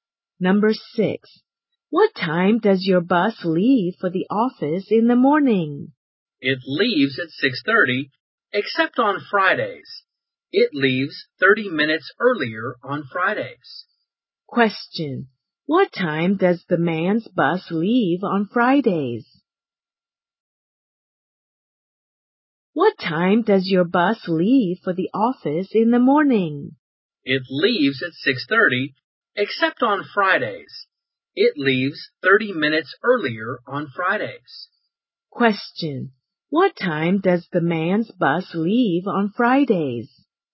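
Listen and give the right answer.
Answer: At 6:00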